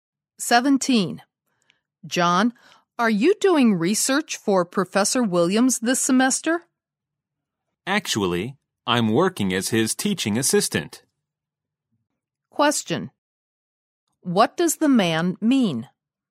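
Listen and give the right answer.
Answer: He isn't doing research for Professor Williams; he is his teaching assistant.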